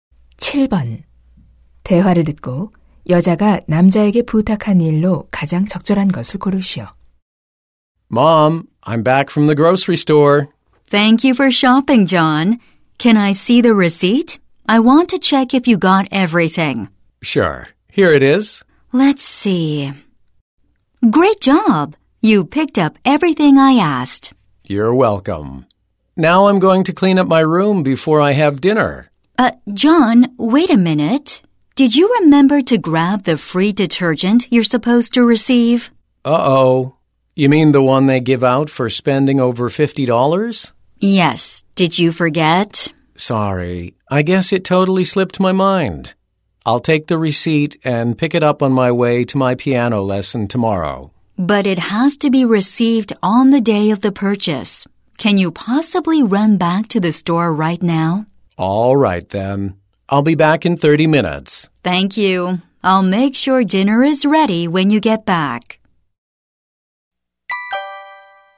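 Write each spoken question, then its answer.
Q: 대화를 듣고 여자가 남자에게 부탁한 일로 가장 적절한 것을 고르시오.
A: 지금 가게에 다시 가서 무료 세제 받아 오기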